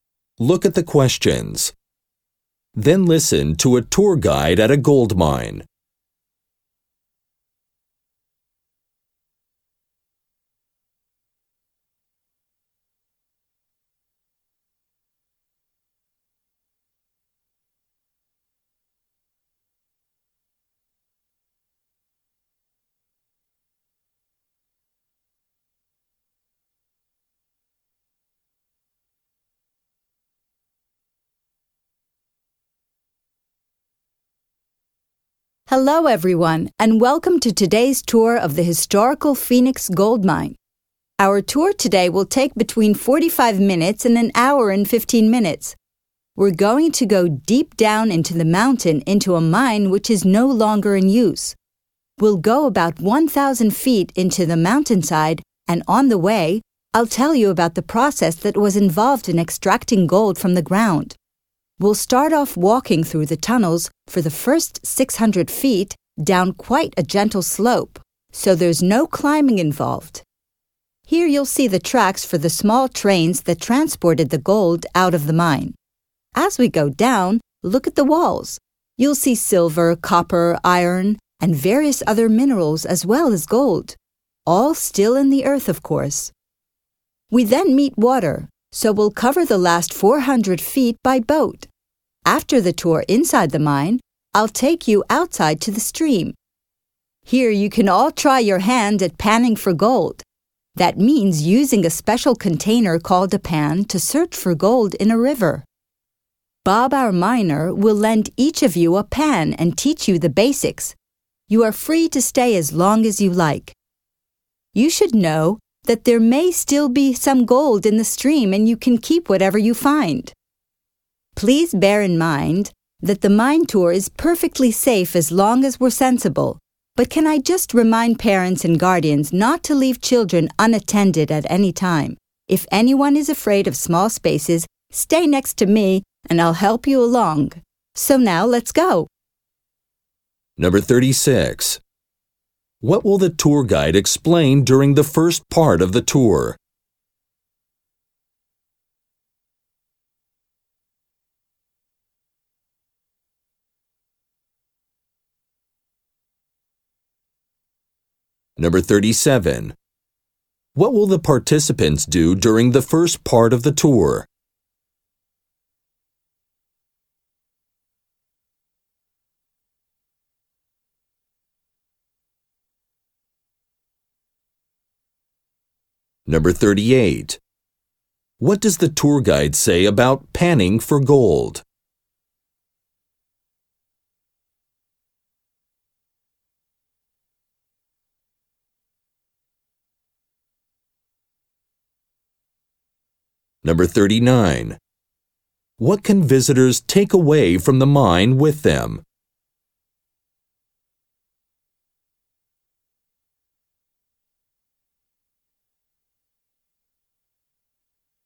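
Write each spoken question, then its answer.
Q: What will the tour guide explain during the first part of the tour?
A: How gold was extracted from the ground

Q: What will the participants do during the first part of the tour?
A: Walk through the tunnels down a gentle slope

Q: What can visitors take away from the mine with them?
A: Any gold they find in the stream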